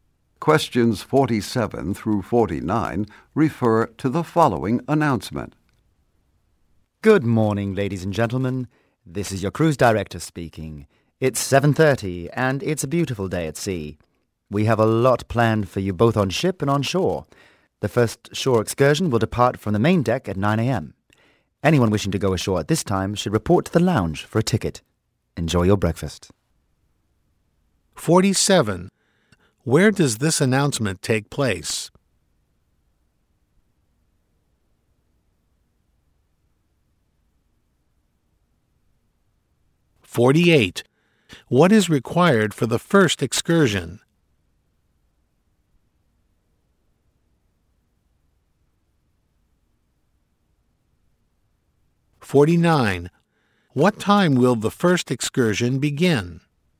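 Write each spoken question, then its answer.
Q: Where does this announcement take place?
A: On a cruise ship

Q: What is required for the first excursion?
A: A ticket

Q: What time will the first excursion begin?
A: 9 a.m.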